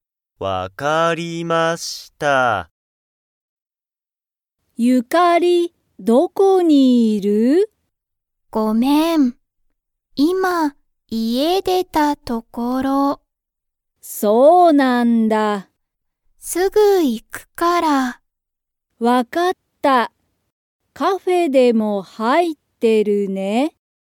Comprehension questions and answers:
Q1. ユカリは、カフェにいますか?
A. はい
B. いいえ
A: いいえ

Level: Level 1

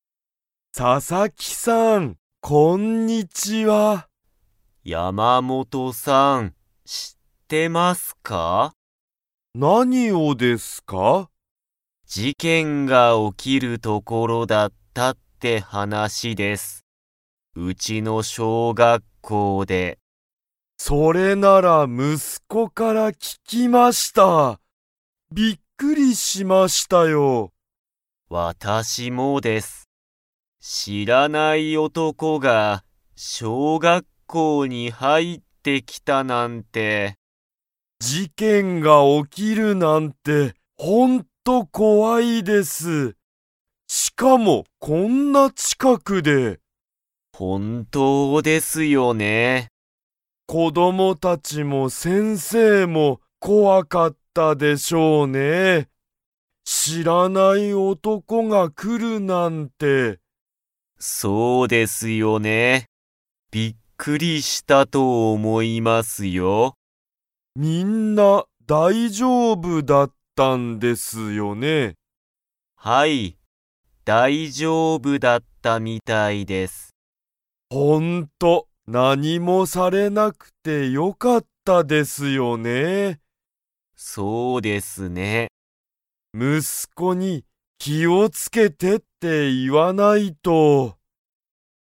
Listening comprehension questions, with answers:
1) 知しらない男おとこは、どこに来きましたか?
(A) 会社かいしゃ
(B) 小学校しょうがっこう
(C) 子こどもの家いえ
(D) 先生せんせいの家いえ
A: 小学校しょうがっこう

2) 子こどもたちと先生せんせいは、みんな 。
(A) 大丈夫だいじょうぶだった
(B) 大丈夫だいじょうぶじゃなかった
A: 大丈夫だいじょうぶだった

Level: Level 3

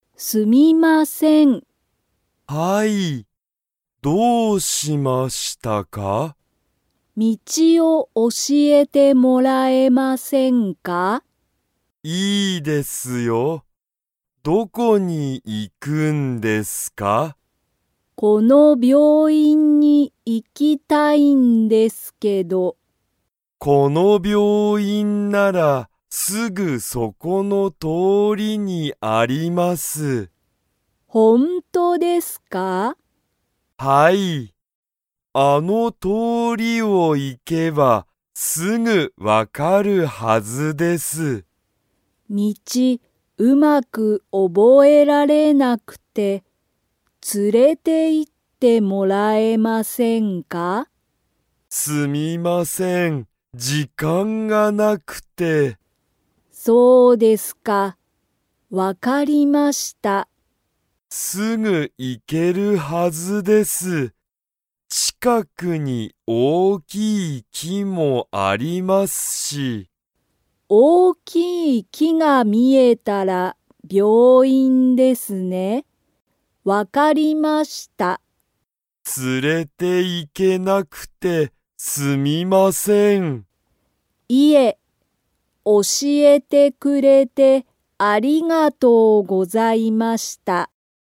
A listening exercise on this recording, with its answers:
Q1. その病院(びょういん)は、____通(とお)りにある。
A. 木(き)がない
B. すぐそこの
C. いつもの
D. この前(まえ)の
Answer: すぐそこの

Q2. エイタはユミコを、病院(びょういん)に連(つ)れて行(い)きますか?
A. はい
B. いいえ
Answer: いいえ

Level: Level 2

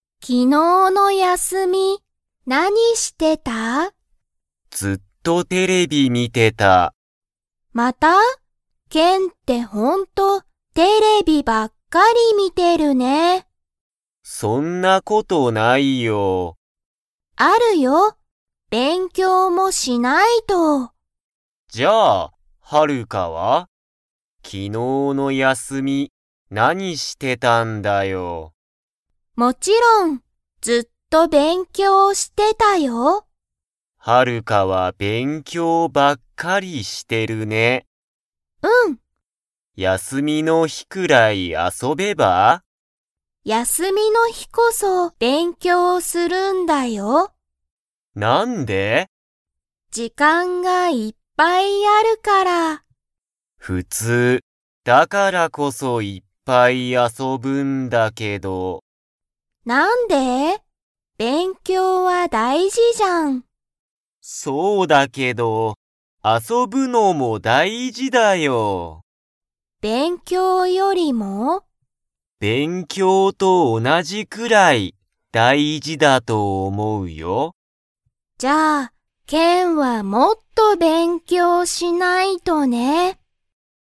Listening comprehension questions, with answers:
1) ケンは、昨日(きのう)の休(やす)みに、勉強(べんきょう)しましたか?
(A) はい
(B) いいえ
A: いいえ

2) ハルカは、休(やす)みの日(ひ)こそ____。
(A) テレビを観みる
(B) 遊(あそ)ぶぶぶ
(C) 勉強(べんきょう)する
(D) 山(やま)に行(い)く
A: 勉強(べんきょう)する

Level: Level 2

